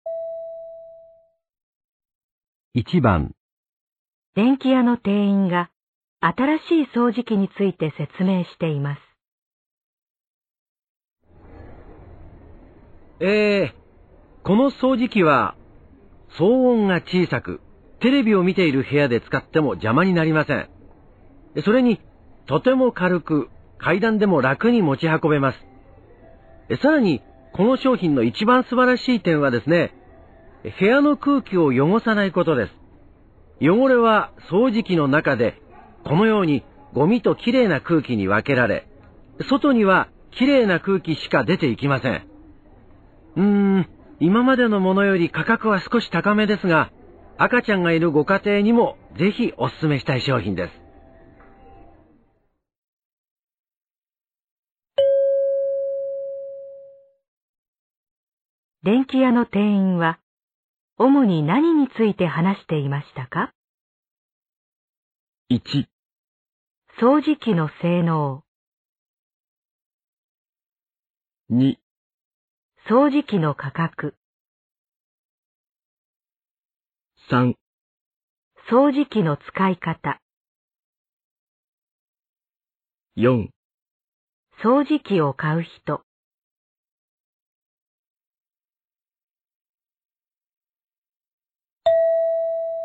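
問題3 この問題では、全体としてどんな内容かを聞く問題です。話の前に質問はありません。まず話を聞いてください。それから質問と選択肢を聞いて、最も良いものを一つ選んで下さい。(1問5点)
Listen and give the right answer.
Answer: 掃除機の性能

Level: N1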